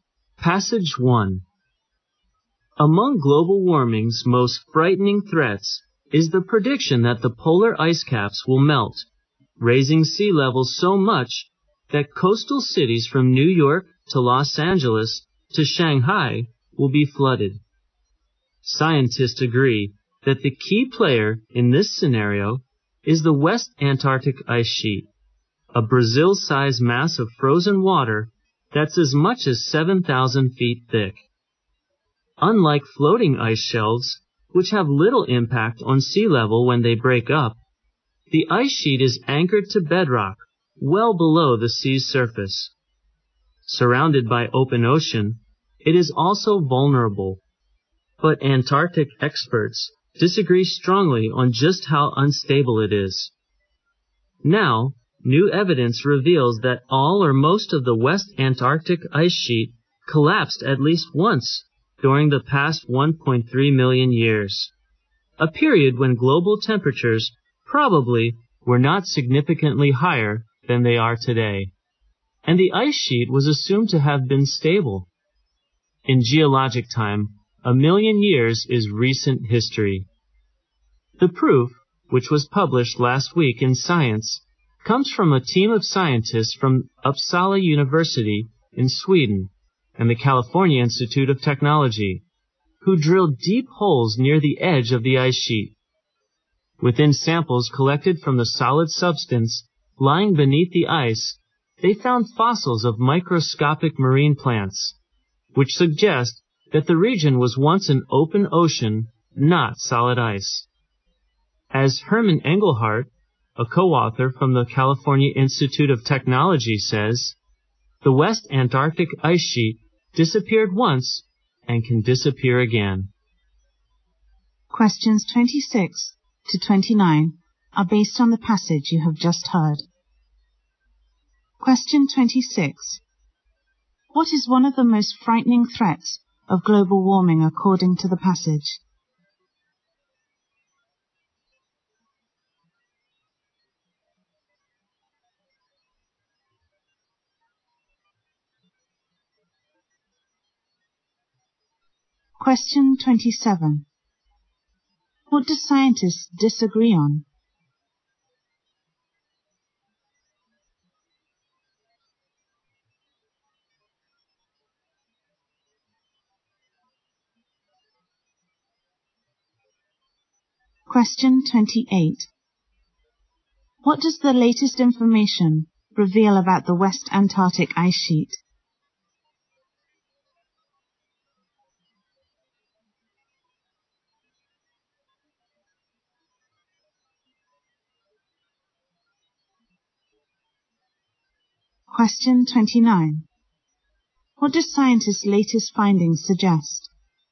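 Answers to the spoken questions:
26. Polar ice caps melting and flooding coastal cities.
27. How unstable the West Antarctic Ice Sheet is.
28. It collapsed at least once in the past 1.3 million years.
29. The West Antarctic ice sheet could disappear again.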